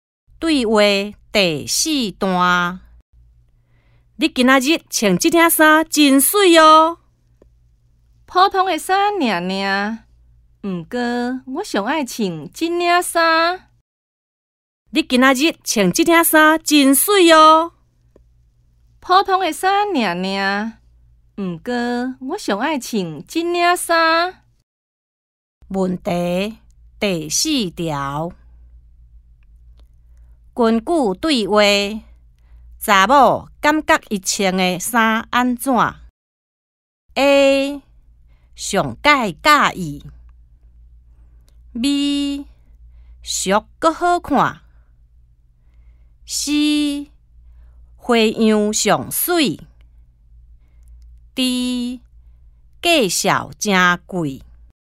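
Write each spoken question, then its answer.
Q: 根据对话。查某感觉伊穿的衫安怎?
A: A: 上介佮意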